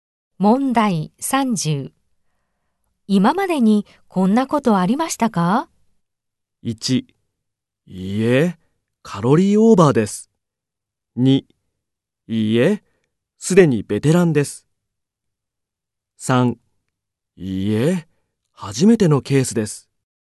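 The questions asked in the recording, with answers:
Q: 今までにこんなことありましたか?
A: 3: いいえ、初めてのケースです。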